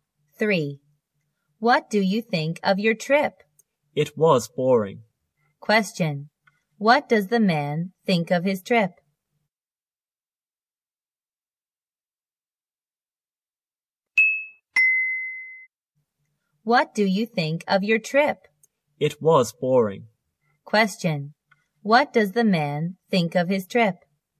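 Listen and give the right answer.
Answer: It was boring.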